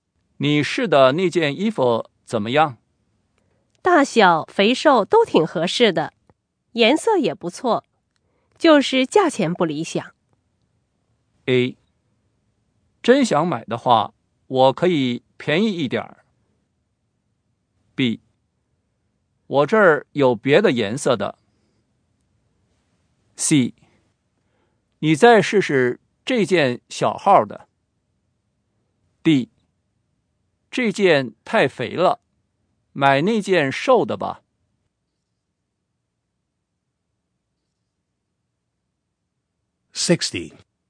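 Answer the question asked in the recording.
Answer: A: 真想买的话,我可以便宜一点。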